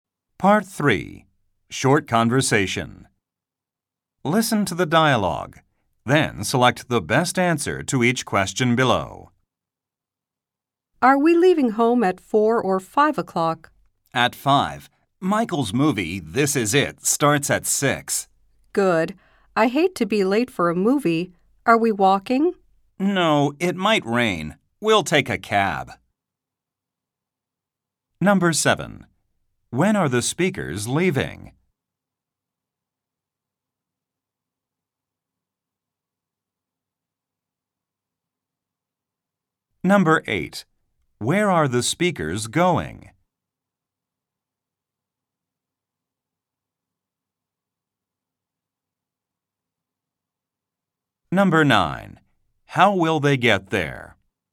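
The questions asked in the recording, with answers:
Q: When are the speakers leaving?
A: At 5 o'clock

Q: Where are the speakers going?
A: To a movie

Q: How will they get there?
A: By cab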